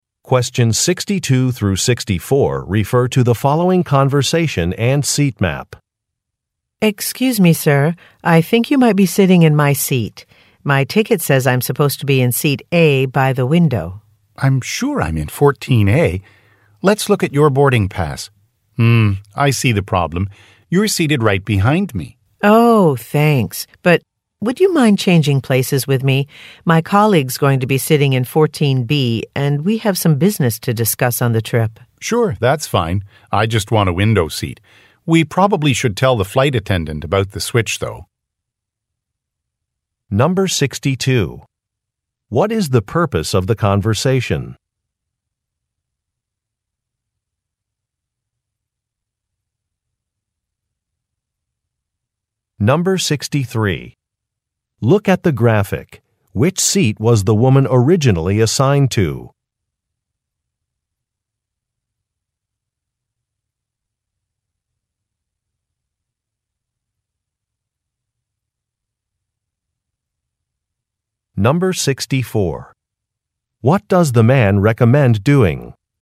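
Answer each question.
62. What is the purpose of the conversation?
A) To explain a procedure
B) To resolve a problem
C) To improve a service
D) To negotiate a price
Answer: B) To resolve a problem

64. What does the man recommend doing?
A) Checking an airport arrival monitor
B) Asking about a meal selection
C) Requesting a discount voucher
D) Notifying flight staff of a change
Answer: D) Notifying flight staff of a change

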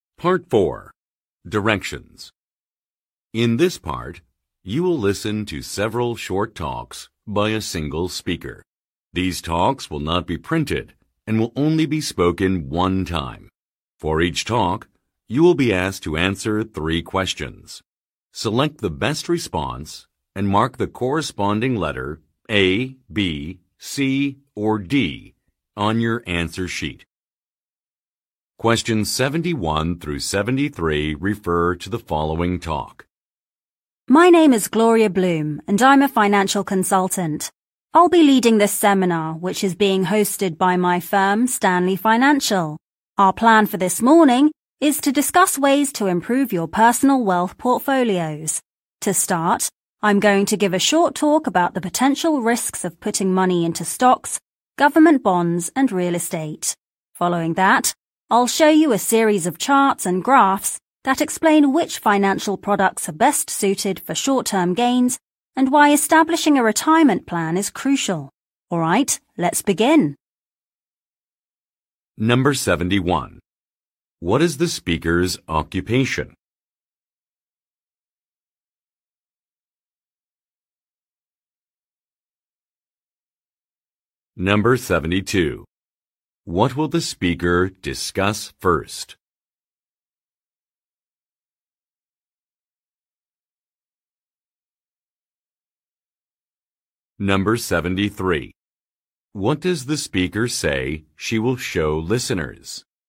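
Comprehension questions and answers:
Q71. What is the speaker's occupation?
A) Government official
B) Professional writer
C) Real estate agent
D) Financial consultant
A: D) Financial consultant

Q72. What will the speaker discuss first?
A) The risks of some investments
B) The goals of a company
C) The price of a service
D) The benefits of savings accounts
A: A) The risks of some investments

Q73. What does the speaker say she will show listeners?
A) A brochure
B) Some photographs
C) A schedule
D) Some diagrams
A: D) Some diagrams

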